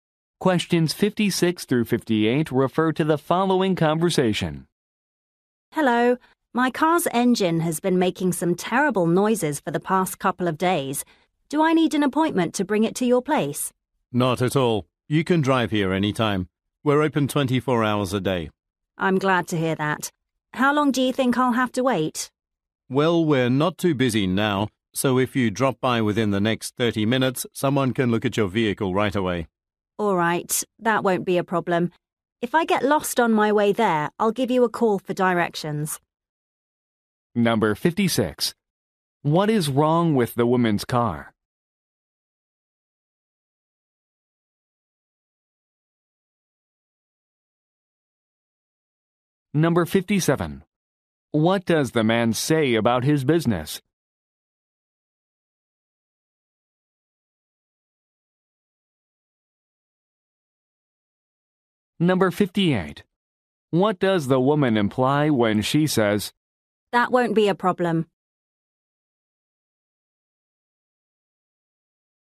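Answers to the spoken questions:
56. The engine is making terrible noises
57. It is open 24 hours a day
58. She can arrive within 30 minutes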